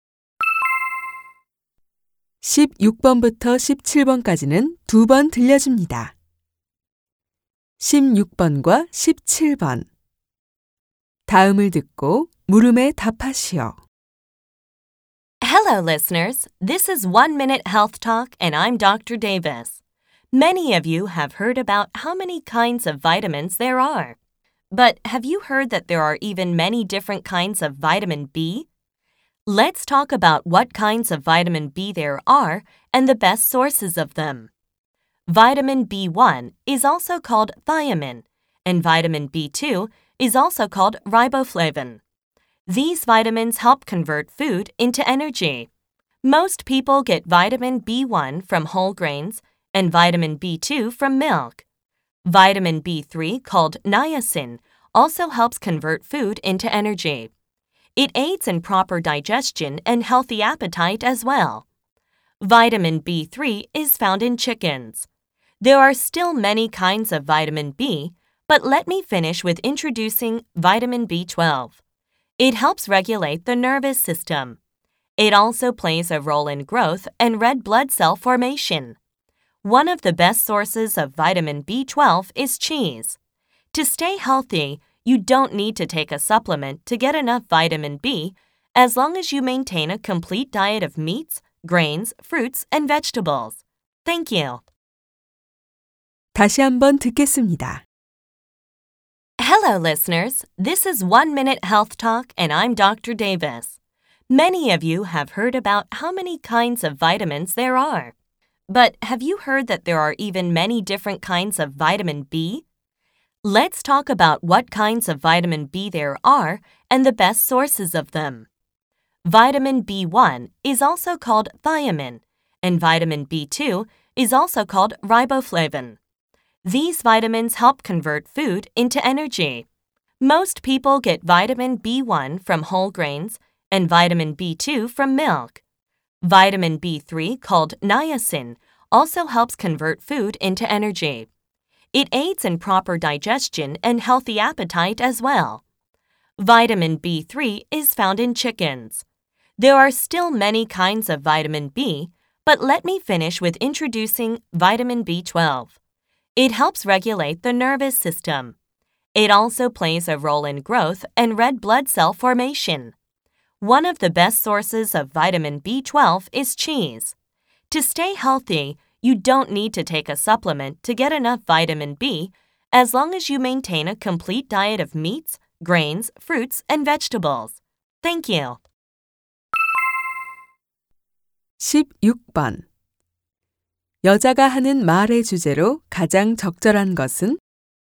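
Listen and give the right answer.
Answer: 비타민 B의 종류와 공급원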